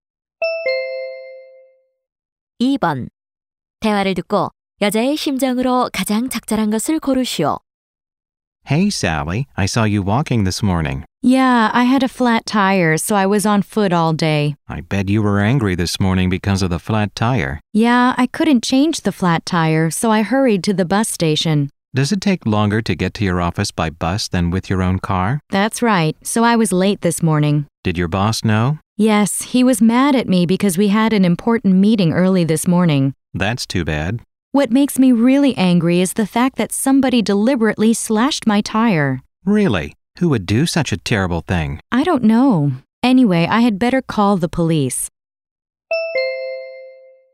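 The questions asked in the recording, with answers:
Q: 대화를 듣고 여자의 심정으로 가장 적절한 것을 고르시오.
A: 화남 (angry)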